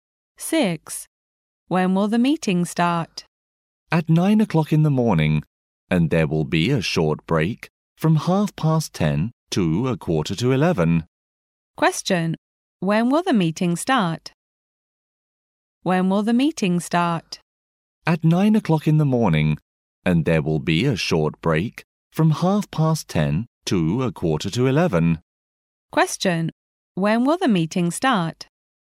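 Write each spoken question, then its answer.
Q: When will the meeting start?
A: At 9 o'clock in the morning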